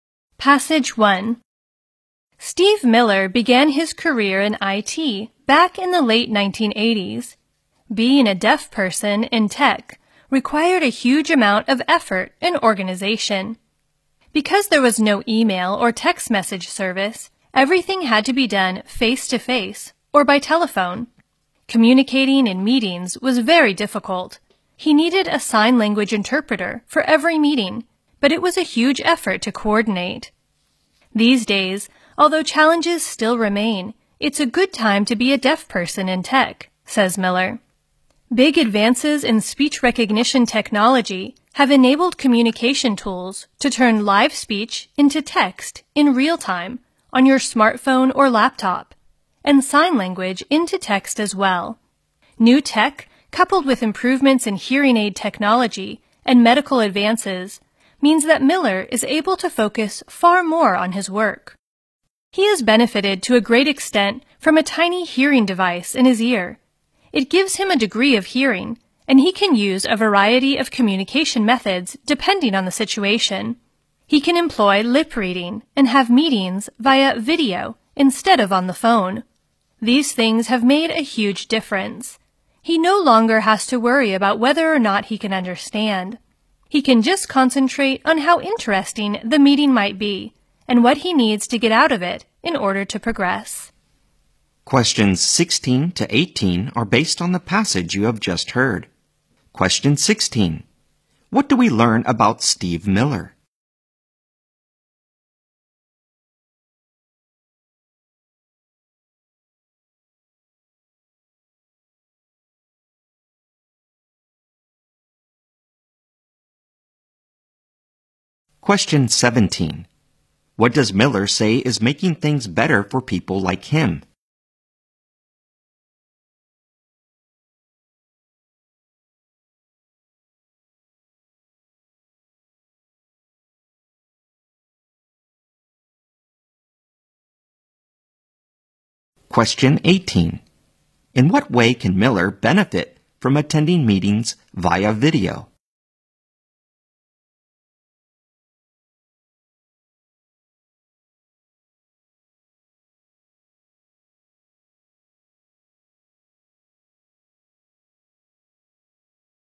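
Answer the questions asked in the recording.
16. He is a deaf person working in IT
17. Advances in speech recognition technology
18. He can use lip reading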